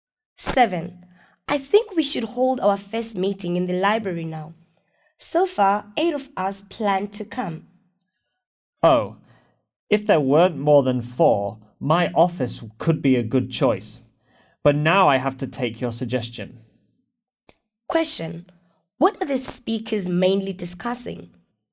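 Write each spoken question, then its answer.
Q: What are the speakers mainly discussing?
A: Where to hold their first meeting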